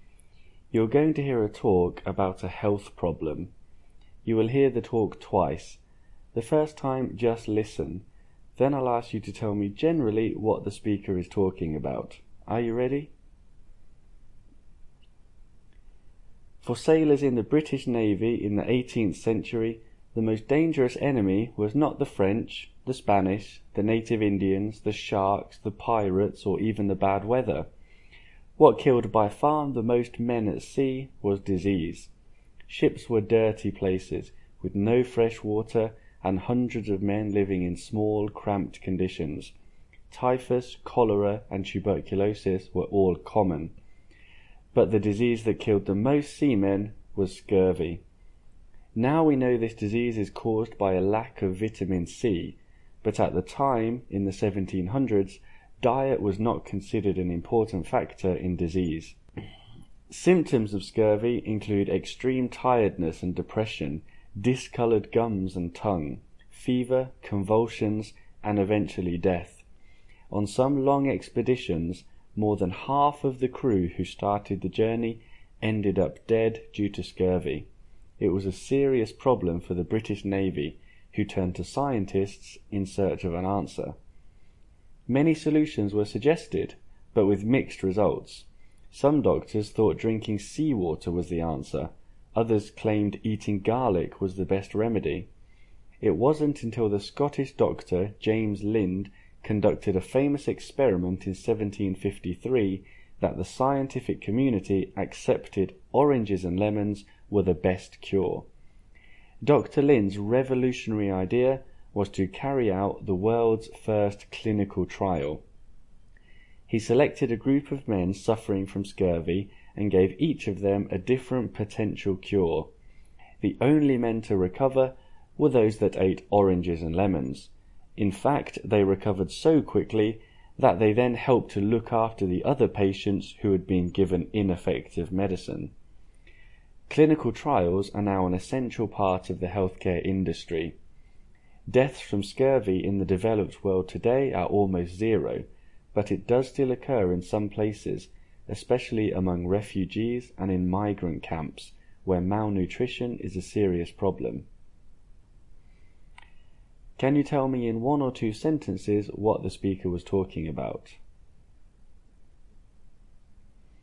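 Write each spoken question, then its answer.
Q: Can you tell me in one or two sentences what the speaker was talking about?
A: Scurvy, a disease that killed many 18th-century British sailors, and how it came to be cured with oranges and lemons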